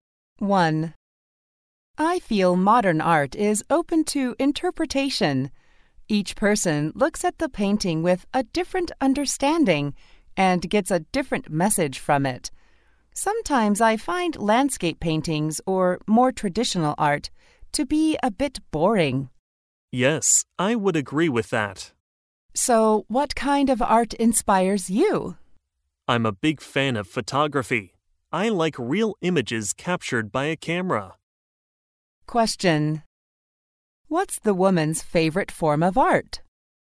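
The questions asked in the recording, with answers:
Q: What's the woman's favorite form of art?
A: Photography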